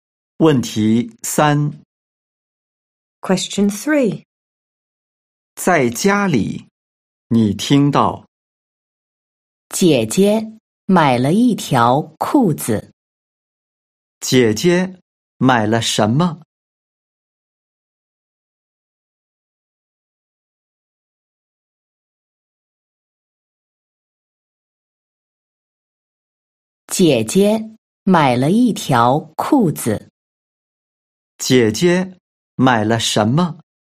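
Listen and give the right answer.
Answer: 一条裤子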